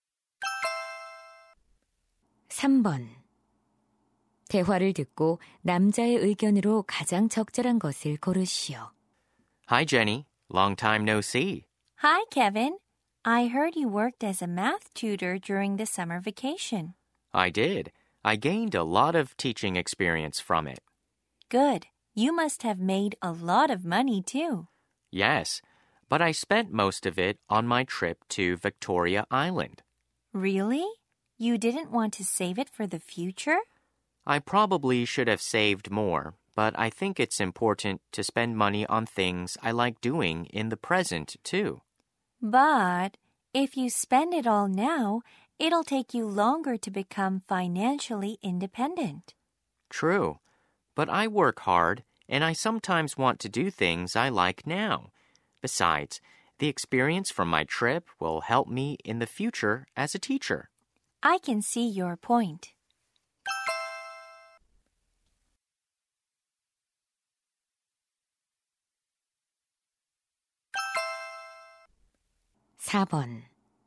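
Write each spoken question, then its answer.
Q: 대화를 듣고 남자의 의견으로 가장 적절한 것을 고르시오.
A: 현재 자신이 좋아하는 일에 돈을 쓰는 것도 중요하다.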